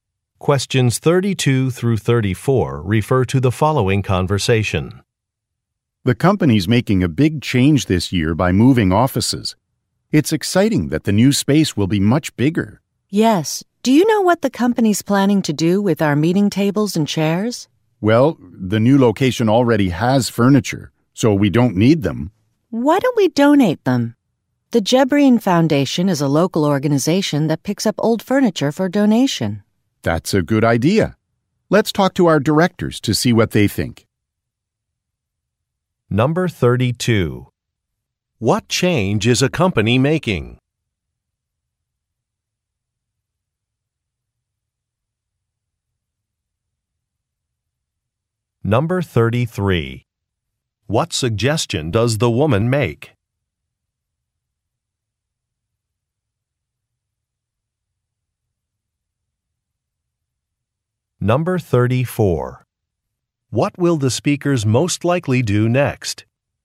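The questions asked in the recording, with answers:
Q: What change is a company making?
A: Moving offices

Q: What suggestion does the woman make?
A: Donating the old furniture

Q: What will the speakers most likely do next?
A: Talk to their directors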